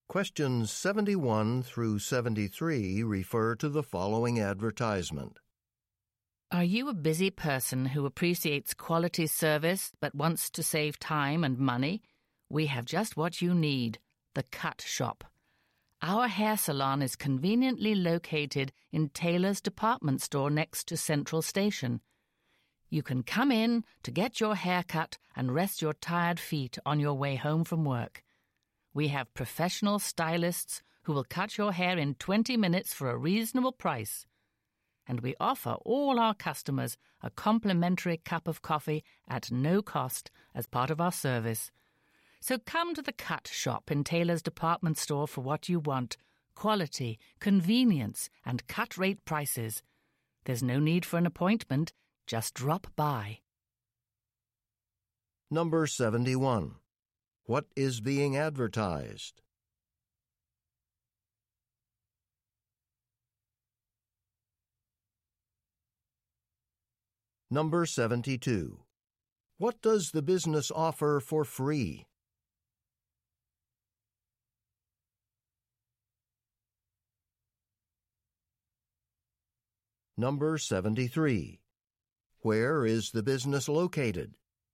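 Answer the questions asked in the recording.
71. A hair salon
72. A cup of coffee
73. In Taylor's Department Store, next to Central Station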